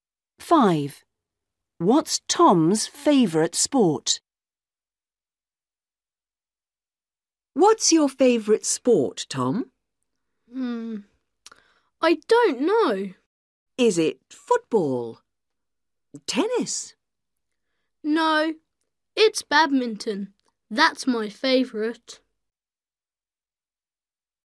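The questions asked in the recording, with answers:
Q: What's Tom's favorite sport?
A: badminton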